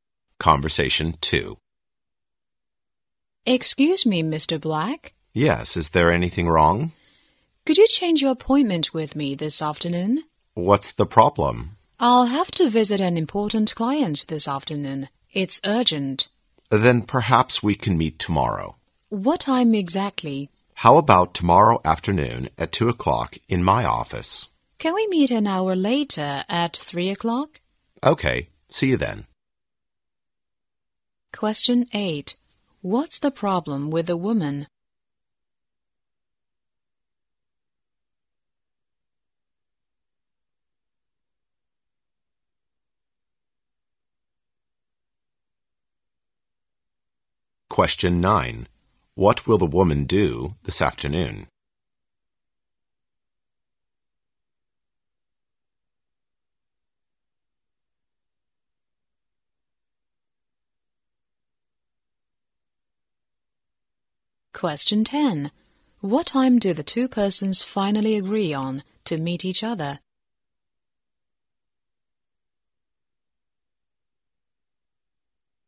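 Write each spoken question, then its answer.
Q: Question 8. What's the problem with the woman?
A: She has to visit an important client this afternoon, so she can't keep the appointment

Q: Question 9. What will the woman do this afternoon?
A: Visit an important client

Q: Question 10. What time do the two persons finally agree on to meet each other?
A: 3 o'clock tomorrow afternoon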